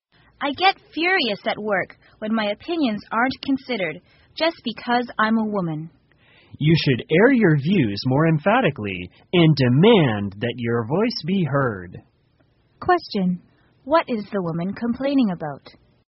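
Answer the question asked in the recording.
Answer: Her opinions at work are ignored because she is a woman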